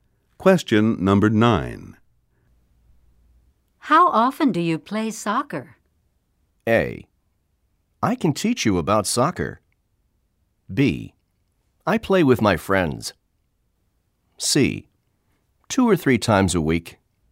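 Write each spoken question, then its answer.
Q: How often do you play soccer?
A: C: 2 or 3 times a week.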